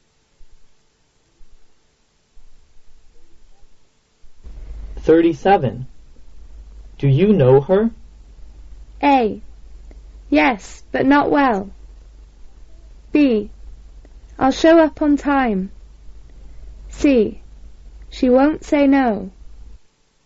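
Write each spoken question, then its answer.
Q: Do you know her?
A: A: Yes, but not well.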